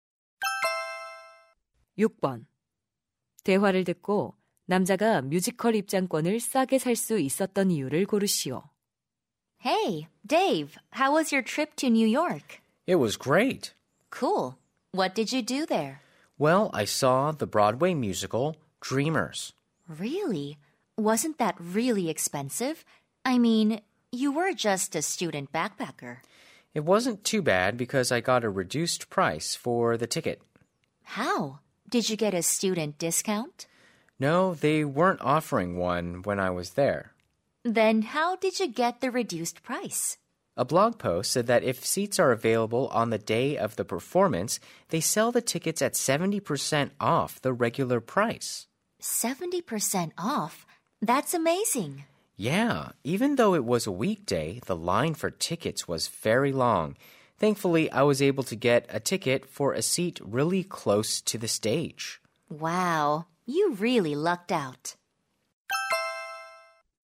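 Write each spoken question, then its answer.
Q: 대화를 듣고 남자가 뮤지컬 입장권을 싸게 살 수 있었던 이유를 고르시오.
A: 공연 당일 남은 좌석을 70% 할인해 팔아서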